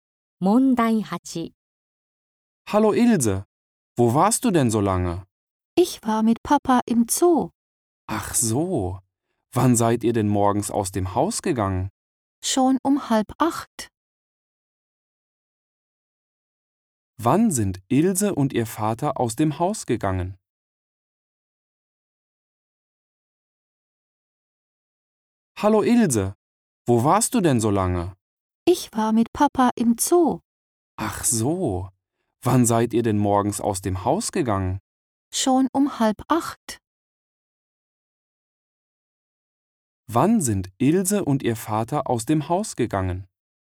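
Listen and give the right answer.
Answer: Um 7:30 Uhr.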